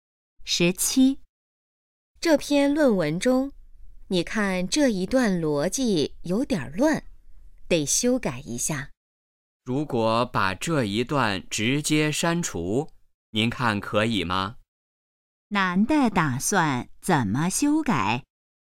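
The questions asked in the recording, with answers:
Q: 男的打算怎么修改?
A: 把这一段直接删除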